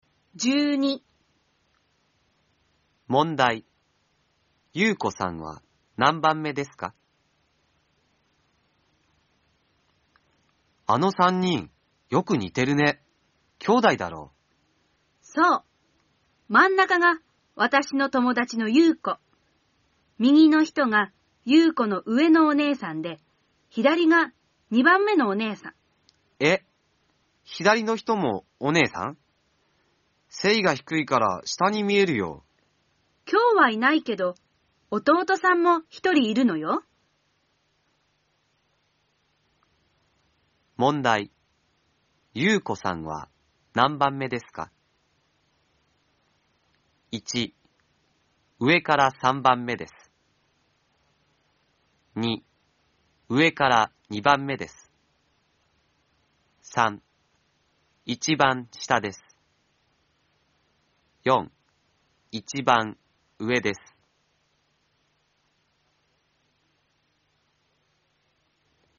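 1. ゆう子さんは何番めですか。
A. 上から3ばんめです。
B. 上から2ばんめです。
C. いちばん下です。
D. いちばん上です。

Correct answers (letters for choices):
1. A

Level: N4 ĐỀ 2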